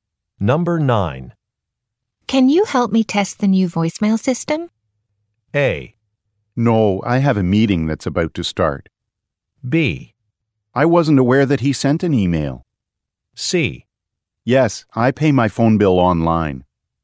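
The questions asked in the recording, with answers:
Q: Can you help me test the new voicemail system?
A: A: No, I have a meeting that's about to start.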